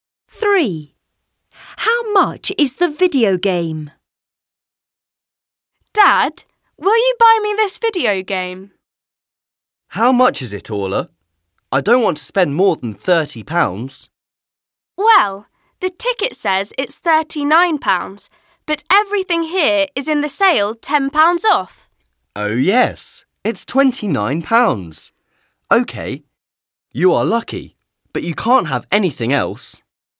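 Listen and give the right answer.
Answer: £29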